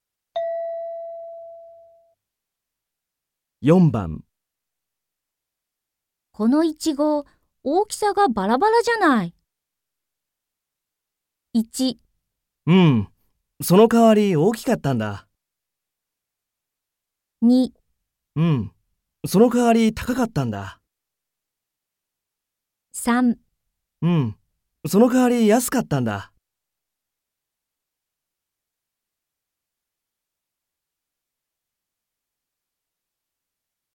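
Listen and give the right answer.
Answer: うん、そのかわり安かったんだ。

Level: N3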